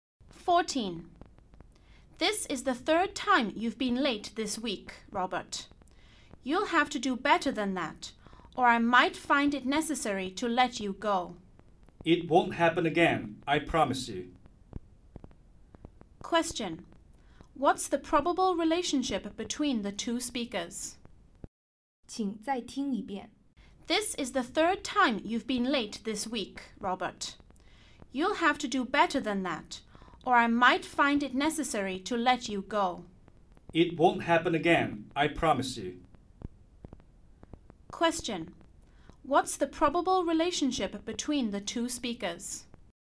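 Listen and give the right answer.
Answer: Boss and employee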